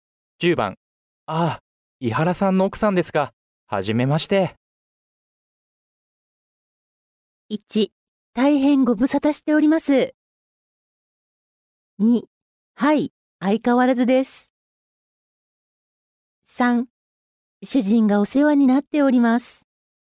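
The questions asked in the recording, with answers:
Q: ああ、伊原さんの奥さんですか。はじめまして。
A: 3: 主人がお世話になっております。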